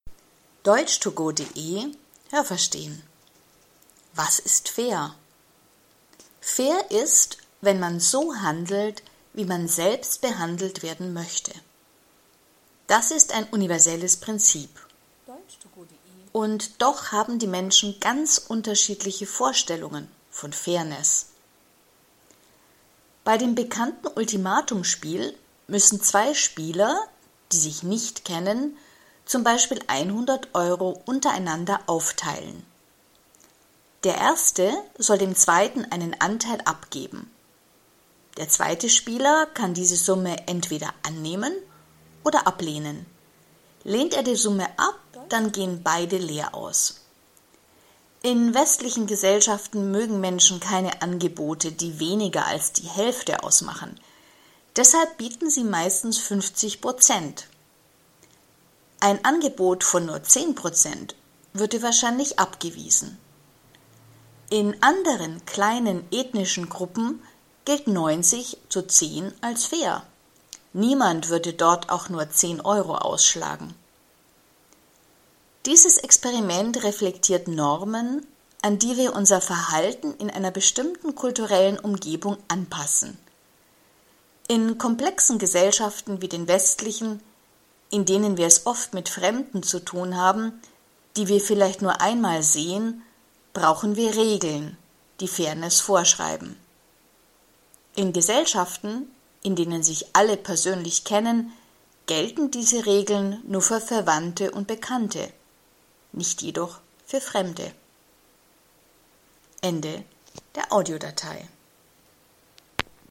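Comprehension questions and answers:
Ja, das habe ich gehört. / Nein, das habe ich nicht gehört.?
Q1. Menschen haben, was Fairness betrifft, ganz verschiedene Vorstellungen.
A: Ja, das habe ich gehört.

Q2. Das „Ultimatum-Spiel": Zwei Bekannte sollen z.B. 100 Euro untereinander aufteilen.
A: Nein, das habe ich nicht gehört.

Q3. Das „Ultimatum-Spiel": Der erste Spieler bietet dem zweiten Spieler einen Anteil an.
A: Ja, das habe ich gehört.

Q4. Das „Ultimatum-Spiel": Es wird so lange gespielt, bis der zweite Spieler die Höhe seines Anteils akzeptiert.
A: Nein, das habe ich nicht gehört.

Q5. In westlichen Gesellschaften gilt ein Angebot als fair, wenn man dem anderen 10 bis 50 Prozent anbietet.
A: Nein, das habe ich nicht gehört.

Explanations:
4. Wenn der zweite Spieler die Höhe seines Anteils nicht akzeptiert, bekommen beide kein Geld.
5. Angebote, die weniger als 50 Prozent ausmachen, mögen Menschen in westlichen Gesellschaften nicht.

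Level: C1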